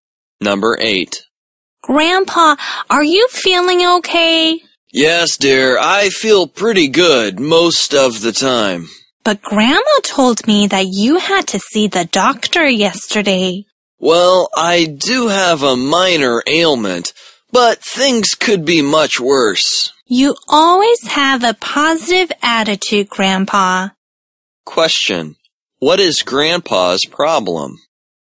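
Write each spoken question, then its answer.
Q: What is Grandpa's problem?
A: A minor ailment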